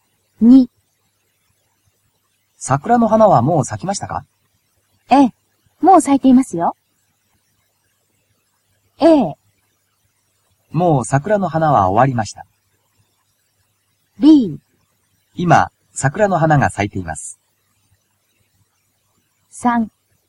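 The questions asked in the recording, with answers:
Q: 桜の花はもう咲きましたか?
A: B: 今、桜の花が咲いています。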